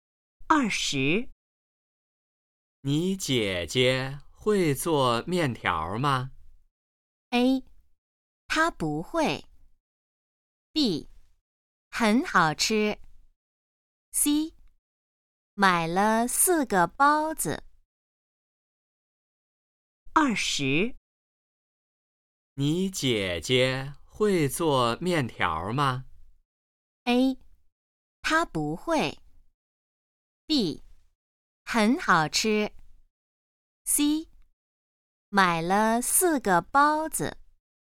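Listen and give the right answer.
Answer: A: 她不会。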